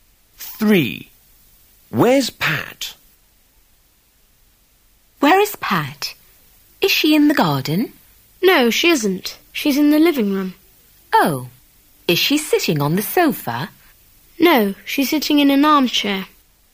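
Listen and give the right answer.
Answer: In the living room, sitting in an armchair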